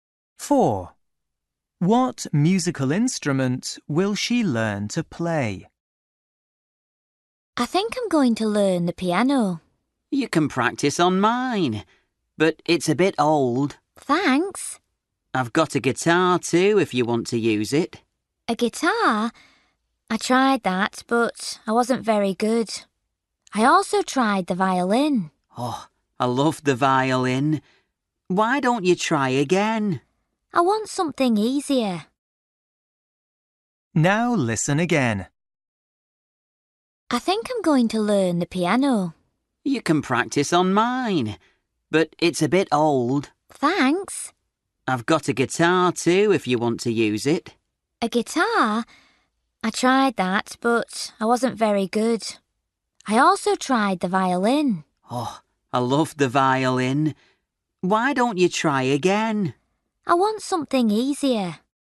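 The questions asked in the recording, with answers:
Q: What musical instrument will she learn to play?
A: The piano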